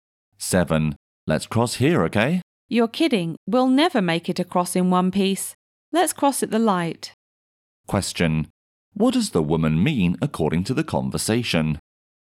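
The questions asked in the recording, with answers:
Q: Question. What does the woman mean according to the conversation?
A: It's dangerous to cross here; they should cross at the light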